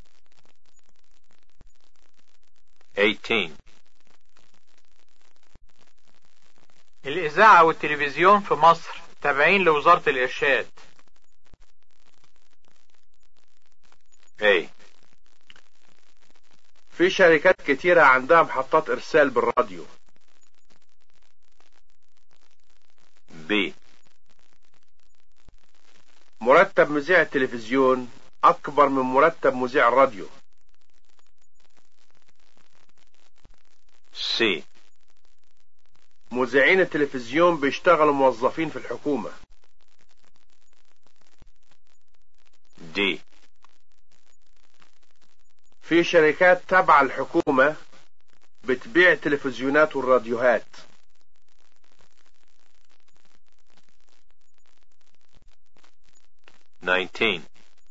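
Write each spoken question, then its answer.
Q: الإذاعة والتلفزيون في مصر تابعين لوزارة الإرشاد.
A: C: مذيعين التلفزيون بيشتغلوا موظفين في الحكومة.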